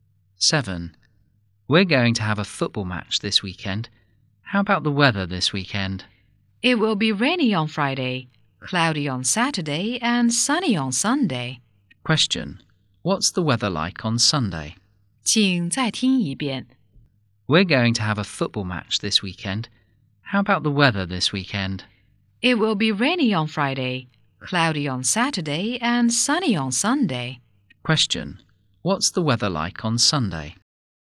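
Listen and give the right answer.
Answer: Sunny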